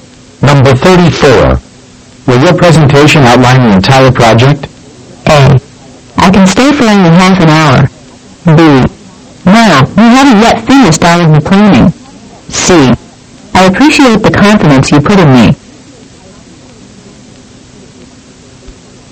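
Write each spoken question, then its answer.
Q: Will your presentation outline the entire project?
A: B: No, we haven't yet finished all of the planning.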